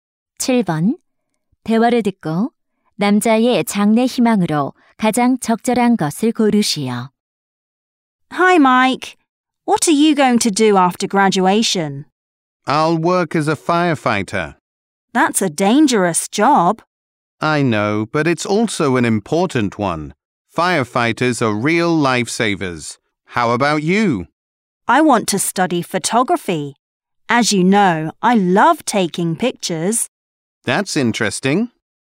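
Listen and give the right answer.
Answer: 소방관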